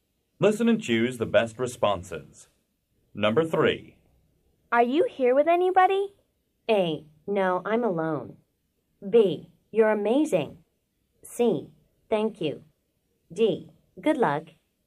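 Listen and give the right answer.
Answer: A: No, I'm alone.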